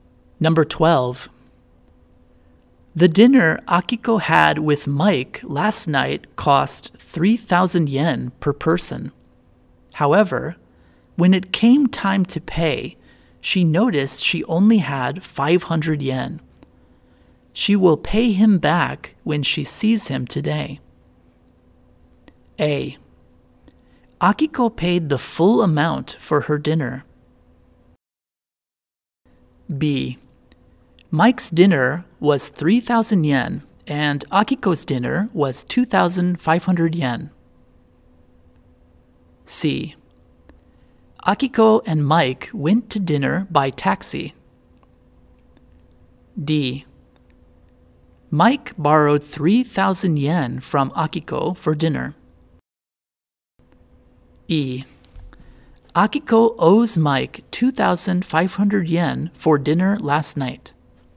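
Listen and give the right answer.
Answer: E: Akiko owes Mike 2,500 yen for dinner last night.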